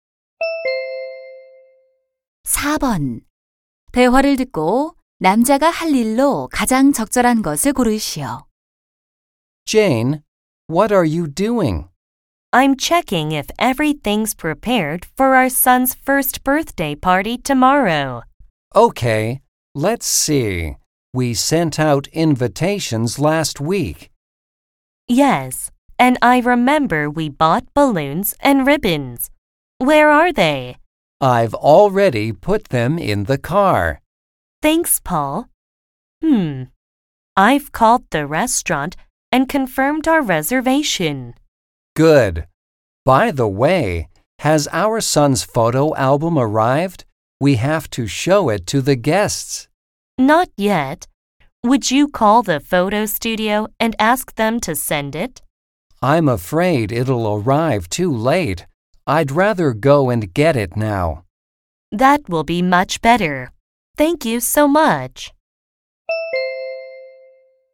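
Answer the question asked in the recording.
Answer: 사진관에 가서 아들의 사진 앨범 가져오기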